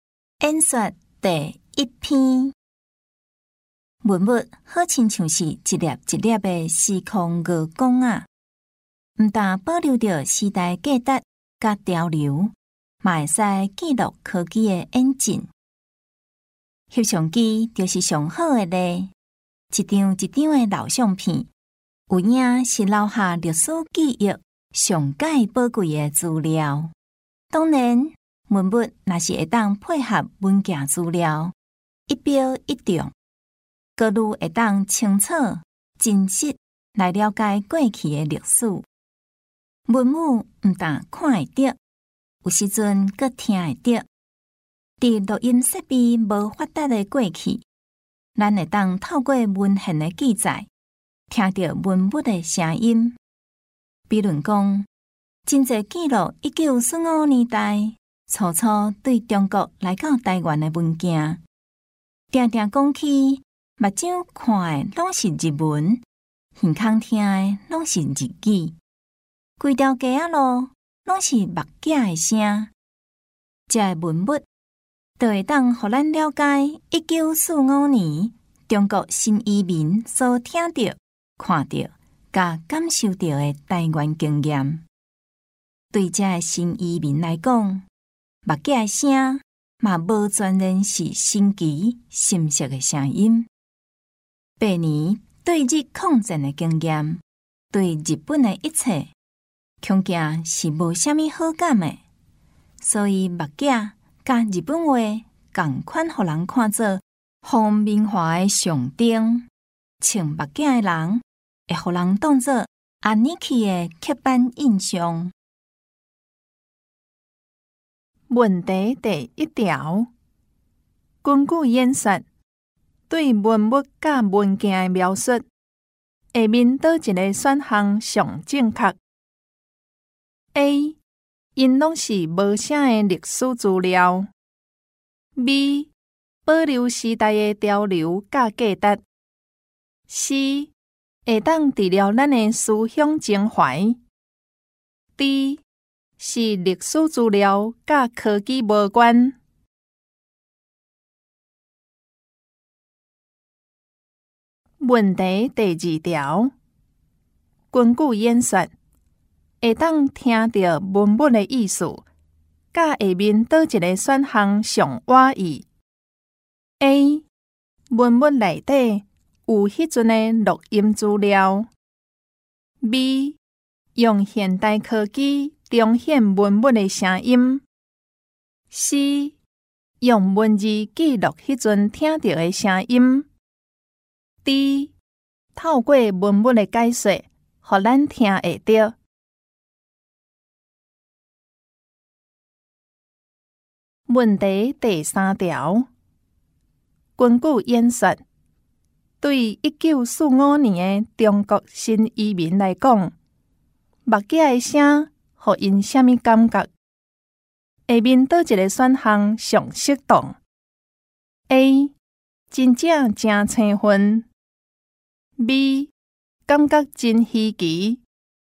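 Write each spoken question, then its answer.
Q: 根据演说对文物甲文件的描述,下面倒一个选项上正确?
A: B: 保留时代的潮流甲价值

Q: 根据演说,会当听到文物的意思,甲下面倒一个选项上挖意。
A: C: 用文字记录迄阵听到的声音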